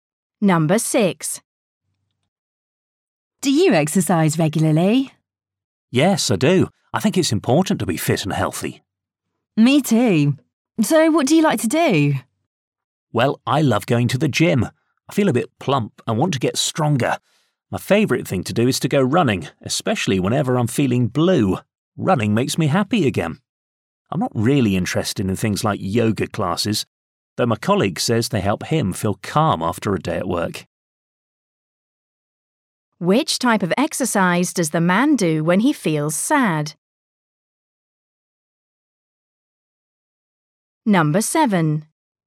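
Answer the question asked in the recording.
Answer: Running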